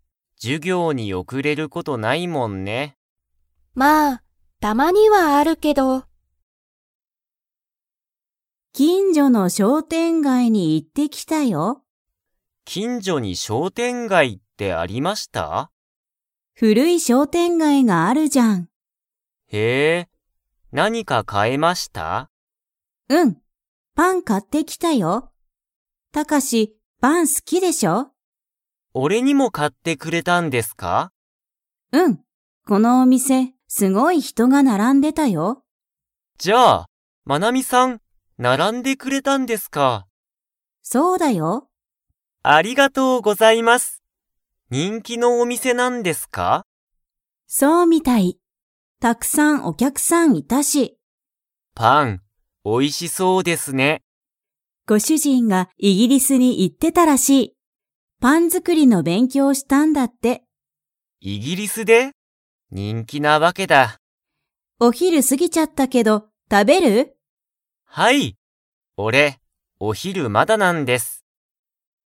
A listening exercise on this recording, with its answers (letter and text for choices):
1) マナミは、どこでパンを買かいましたか?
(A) 商店街しょうてんがい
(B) デパート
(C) イギリス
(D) お昼ひる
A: (A) 商店街しょうてんがい

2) タカシはごはんを 。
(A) もう食たべた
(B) まだ食たべてない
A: (B) まだ食たべてない

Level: Level 4